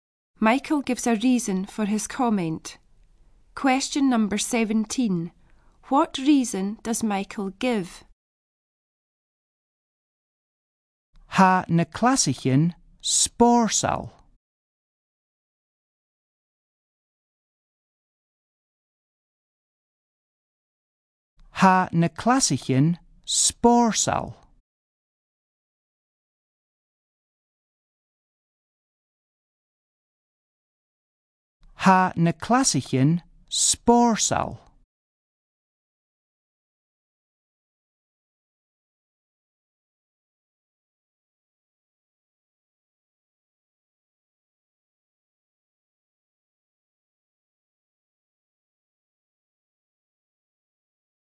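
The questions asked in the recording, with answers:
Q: What reason does Michael give?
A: The classes are fun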